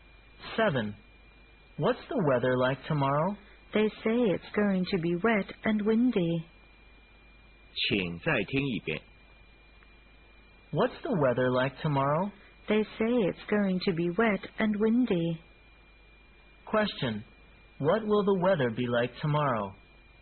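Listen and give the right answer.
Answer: Wet and windy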